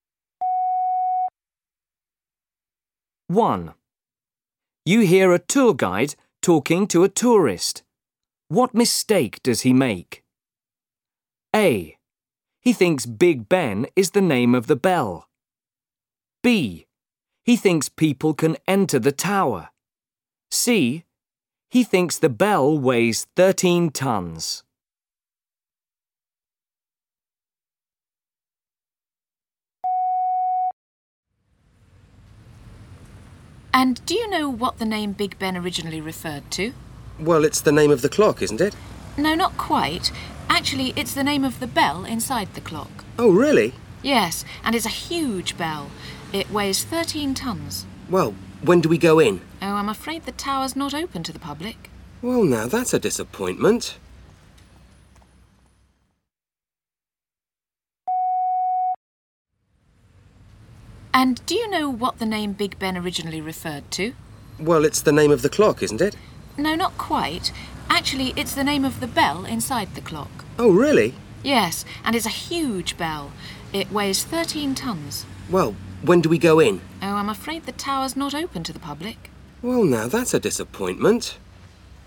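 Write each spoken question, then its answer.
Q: What mistake does he make?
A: B: He thinks people can enter the tower.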